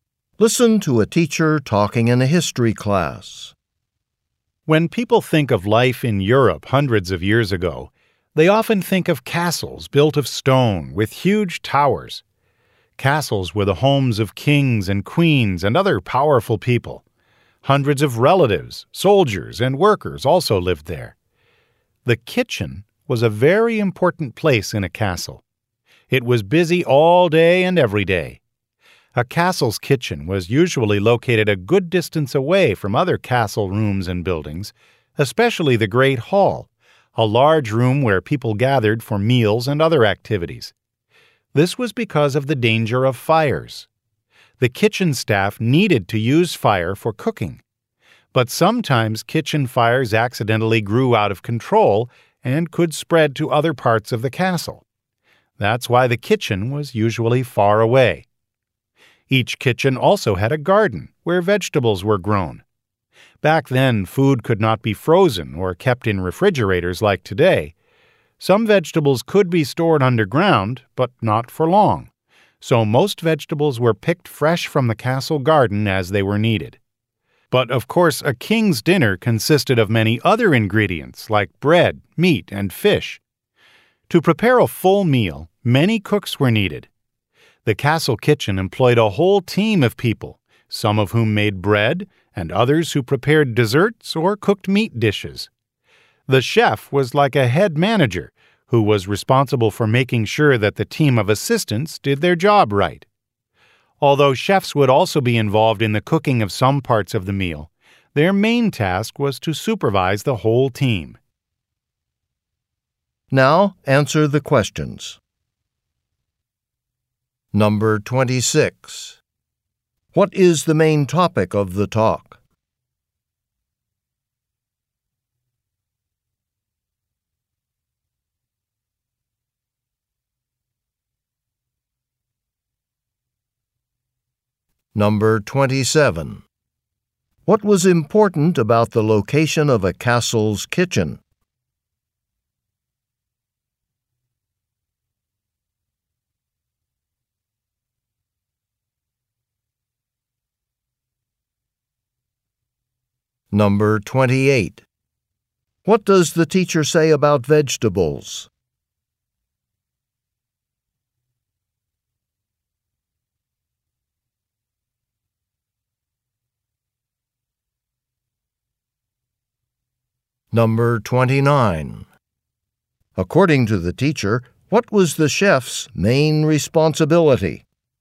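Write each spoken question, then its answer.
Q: What is the main topic of the talk?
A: The kitchens in medieval European castles

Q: What was important about the location of a castle's kitchen?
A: It was far from other rooms, especially the Great Hall, because of the danger of fires

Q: What does the teacher say about vegetables?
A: Most were grown in the castle garden and picked fresh when needed

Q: According to the teacher, what was the chef's main responsibility?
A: Supervising the whole kitchen team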